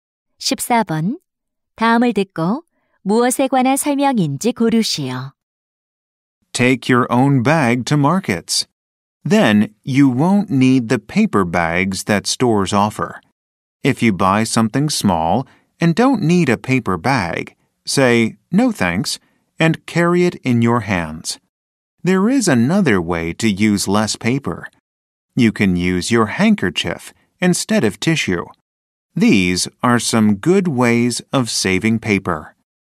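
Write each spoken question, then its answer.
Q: 다음을 듣고 무엇에 관한 설명인지 고르시오.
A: 종이를 절약하는 방법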